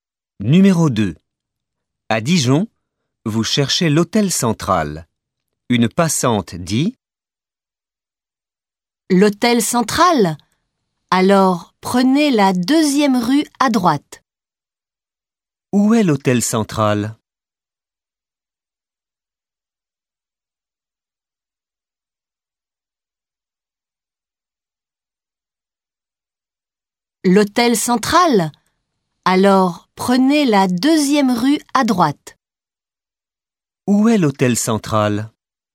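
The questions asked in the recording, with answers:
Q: Où est l'hôtel central ?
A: Deuxième rue à droite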